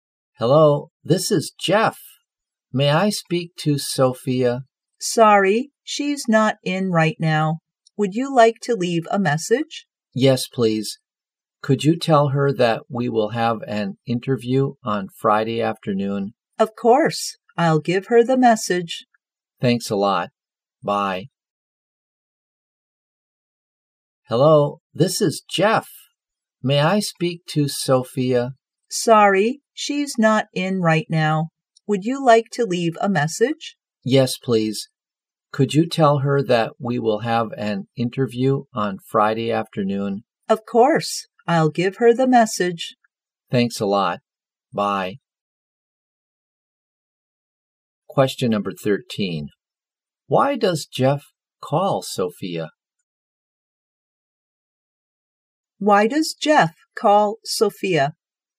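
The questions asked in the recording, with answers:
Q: Why does Jeff call Sophia?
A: To tell her about an interview on Friday afternoon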